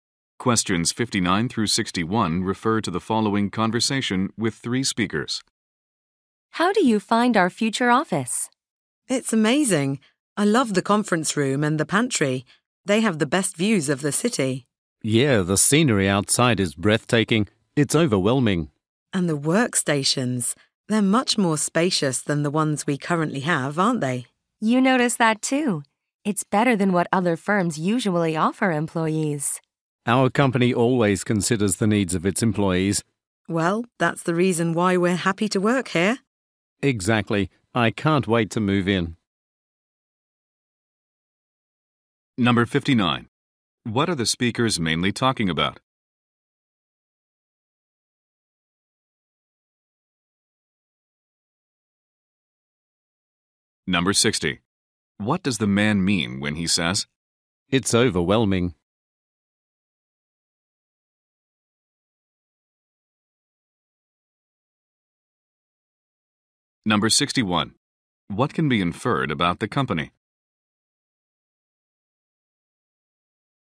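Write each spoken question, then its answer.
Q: What are the speakers mainly talking about?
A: Their new office.

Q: What does the man mean when he says,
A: He is very impressed by the view.

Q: What can be inferred about the company?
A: It cares about its employees' needs.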